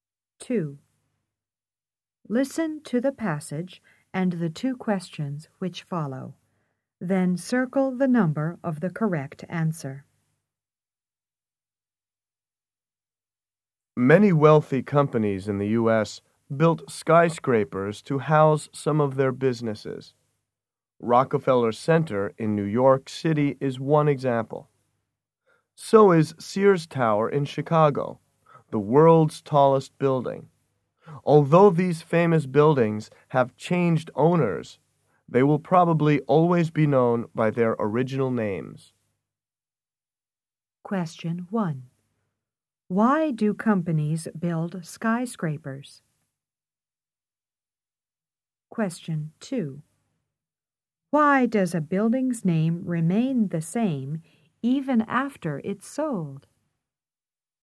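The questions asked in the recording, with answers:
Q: Why do companies build skyscrapers?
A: To house some of their businesses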